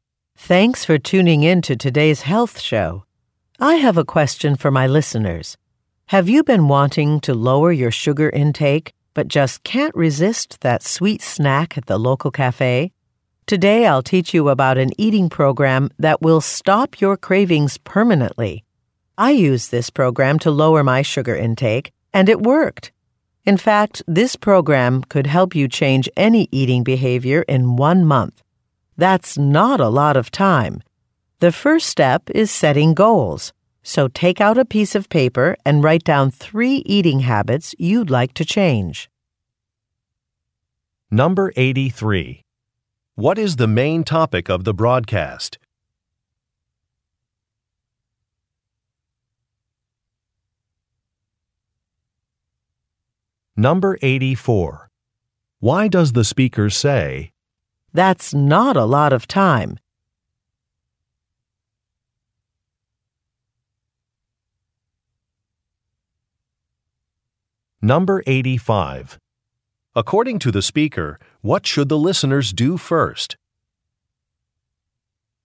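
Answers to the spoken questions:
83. An eating program to change eating habits (lower sugar intake)
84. To stress that the program works quickly (one month)
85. Set goals by writing down 3 eating habits to change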